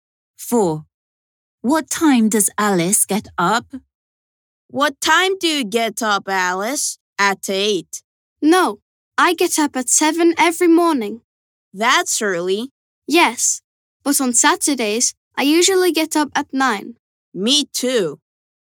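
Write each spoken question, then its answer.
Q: What time does Alice get up?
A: at 7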